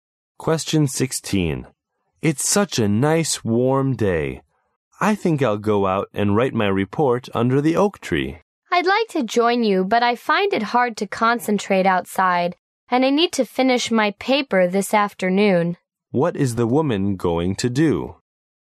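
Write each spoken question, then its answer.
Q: What is the woman going to do?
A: Stay inside and finish her paper this afternoon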